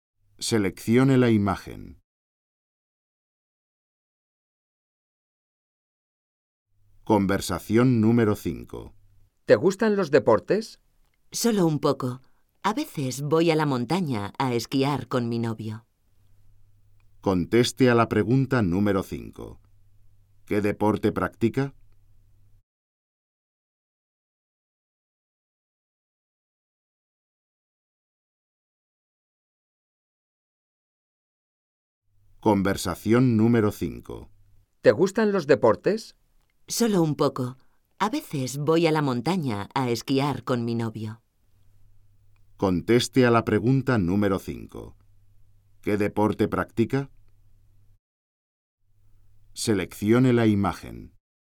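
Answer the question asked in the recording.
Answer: Esquí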